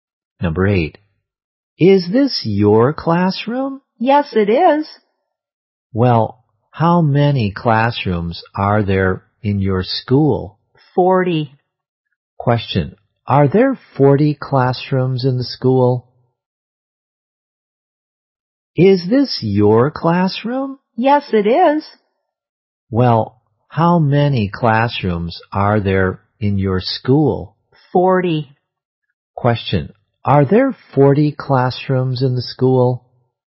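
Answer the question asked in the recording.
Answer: Yes, there are.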